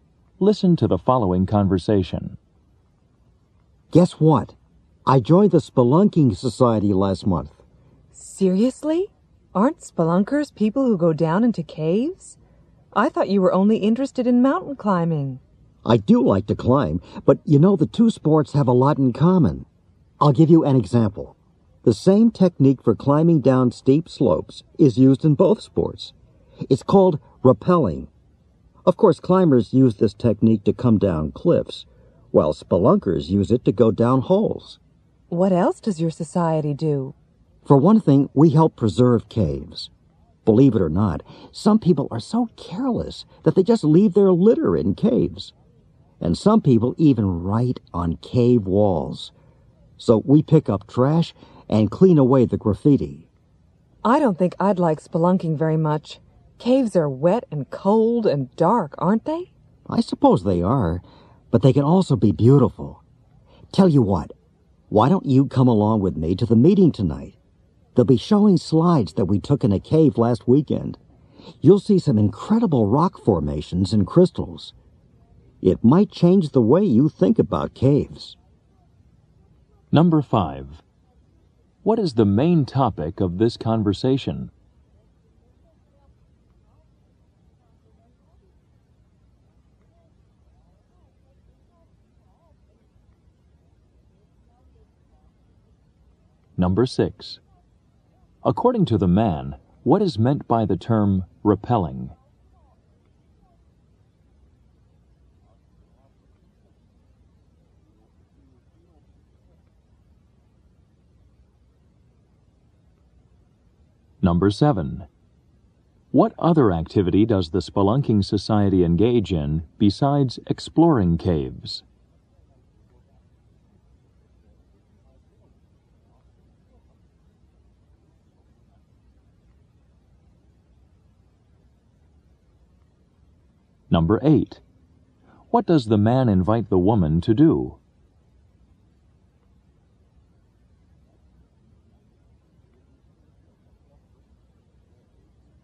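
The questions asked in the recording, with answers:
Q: What is the main topic of this conversation?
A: Spelunking, or exploring caves, and the man's spelunking society

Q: According to the man, what is meant by the term rappelling?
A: A technique for climbing down steep slopes

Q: What other activity does the Spelunking Society engage in besides exploring caves?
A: Preserving caves by picking up trash and cleaning away graffiti

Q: What does the man invite the woman to do?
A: Come with him to the society meeting tonight to see slides of a cave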